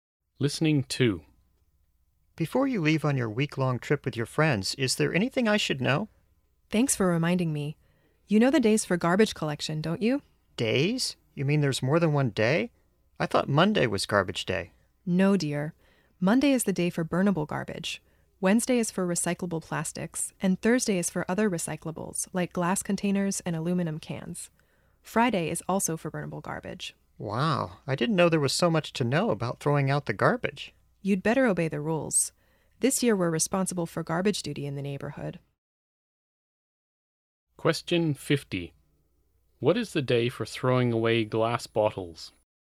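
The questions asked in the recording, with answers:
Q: What is the day for throwing away glass bottles?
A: Thursday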